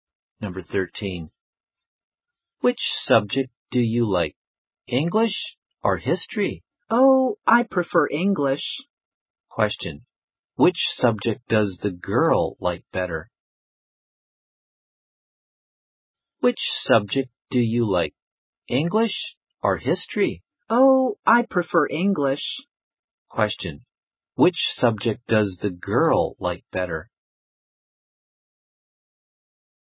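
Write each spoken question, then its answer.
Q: Question. Which subject does the girl like better?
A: English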